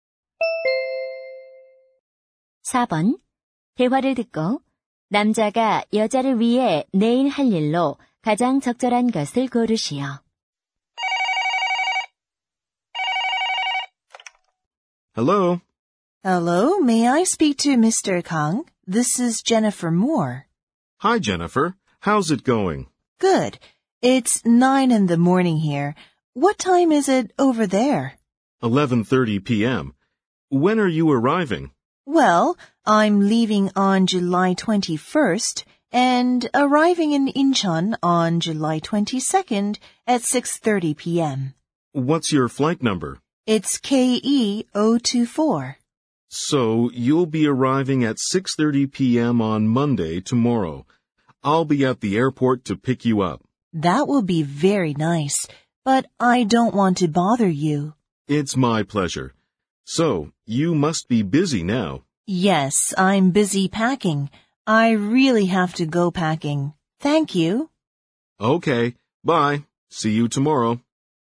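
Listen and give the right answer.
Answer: 공항에 마중 나가기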